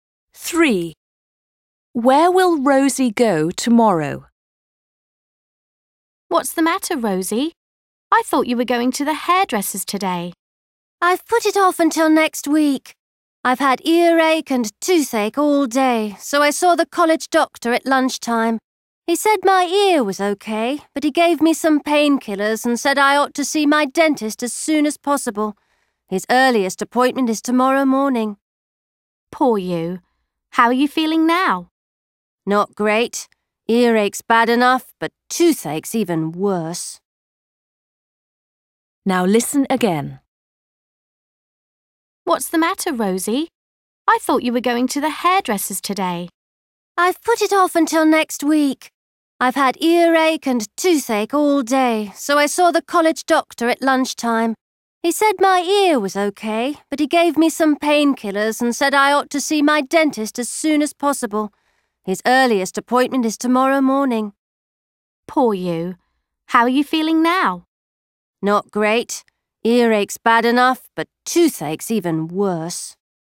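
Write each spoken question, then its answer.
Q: Where will Rosie go tomorrow?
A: To the dentist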